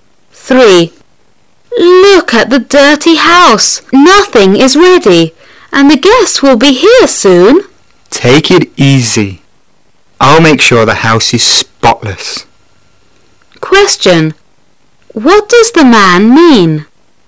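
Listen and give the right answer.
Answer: He will clean the house.

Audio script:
[解析] Woman: Look at the dirty house! Nothing gets ready, and the guests will be here soon! Man: Take it easy. I'll make sure the house is Spotless. Question: What does the man mean?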